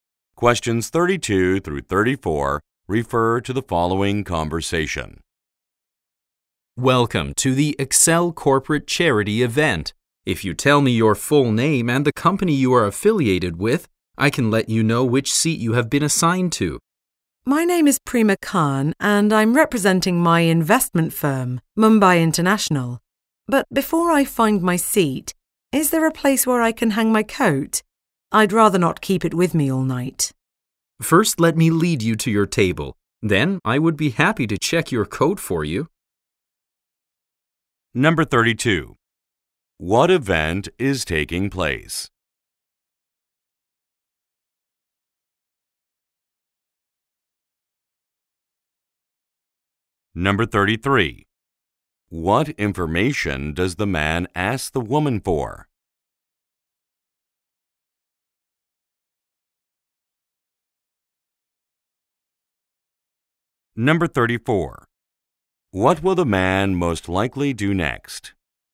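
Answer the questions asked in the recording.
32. A corporate charity event
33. Her full name and company
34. Lead her to her table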